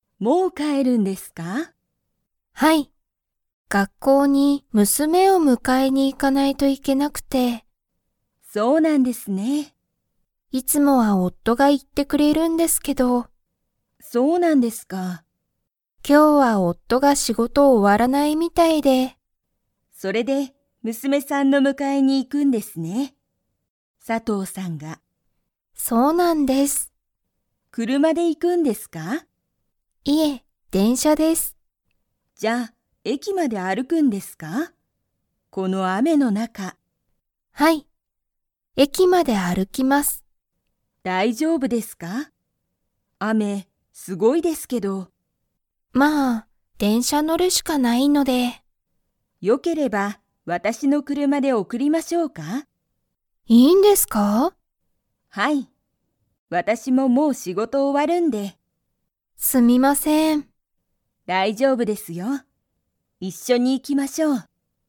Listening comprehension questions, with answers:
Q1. いつもは誰だれが佐藤さとうさんの娘むすめを迎むかえに行いきますか?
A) 佐藤さとうさん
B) 佐藤さとうさんの夫おっと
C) 田中たなかさん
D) 田中たなかさんの夫おっと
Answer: 佐藤さとうさんの夫おっと

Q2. 今日きょう、佐藤さとうさんは電車でんしゃで迎むかえに 。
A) 行いく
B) 行いかない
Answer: 行いかない

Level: Level 3

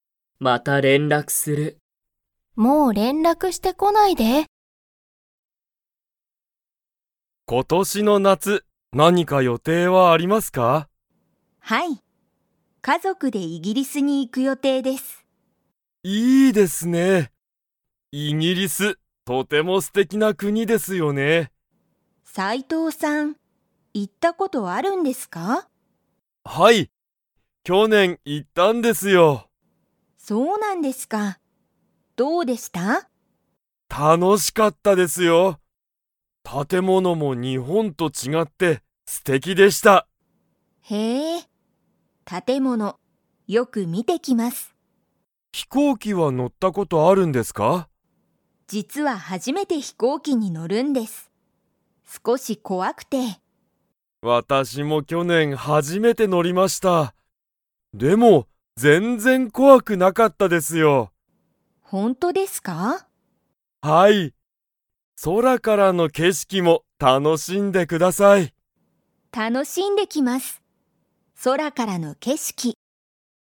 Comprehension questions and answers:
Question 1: 斉藤さいとうさんは、イギリスに行いったことが 。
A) ある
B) ない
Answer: ある

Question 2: 松井まついさんは、何なにに乗のるのが怖こわいですか?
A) バス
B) 車くるま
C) 飛行機ひこうき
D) 船ふね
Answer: 飛行機ひこうき

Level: Level 4

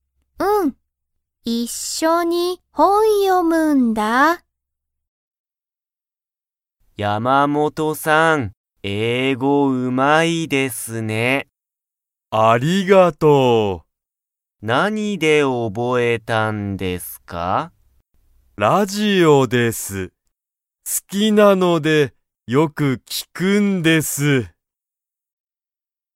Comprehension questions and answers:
Comprehension Quiz (Skip if you don't understand the conversation yet)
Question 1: 山本(やまもと)さんは、____で英語(えいご)を覚(おぼ)えた。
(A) 本(ほん)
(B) テレビ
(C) 映画(えいが)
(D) ラジオ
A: ラジオ

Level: Level 1

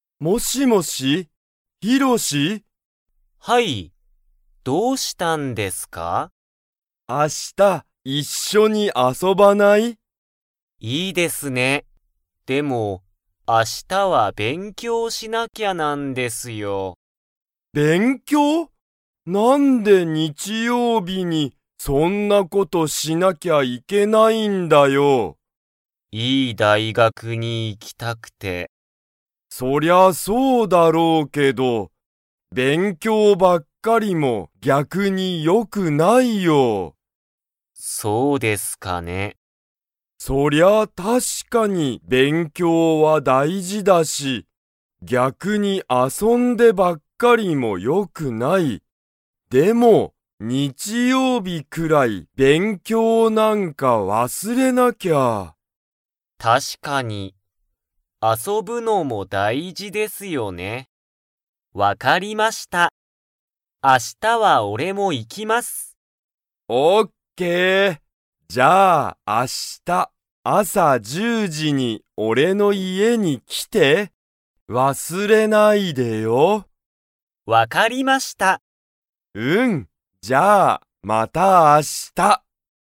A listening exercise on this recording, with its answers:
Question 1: タカヒロは、明日(あした)、ヒロシと勉強(べんきょう)したいですか?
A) はい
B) いいえ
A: いいえ

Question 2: ヒロシは、明日(あした)、朝(あさ)10時(じ)に_____に行(い)く。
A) ヒロシの学校(がっこう)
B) タカヒロの家いえ)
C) ヒロシの部屋(へや)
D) タカヒロのクラス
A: タカヒロの家いえ)

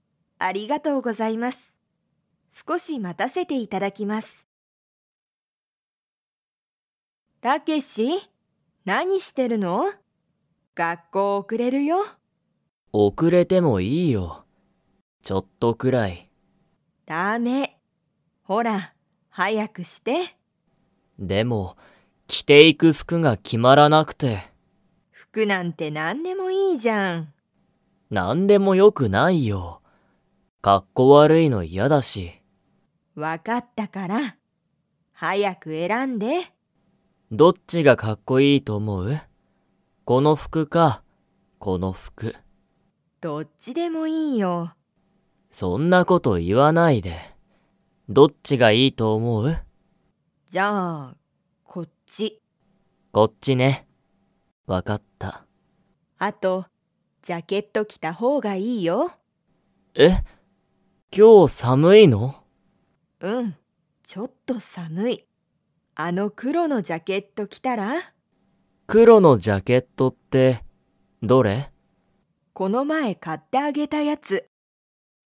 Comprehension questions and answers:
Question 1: タケシは、 が決(き)まらない。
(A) 仕事(しごと)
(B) バッグ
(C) 服(ふく)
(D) 靴(くつ)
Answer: 服(ふく)

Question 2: 今日(きょう)は寒(さむ)いですか?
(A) はい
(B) いいえ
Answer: はい

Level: Level 4

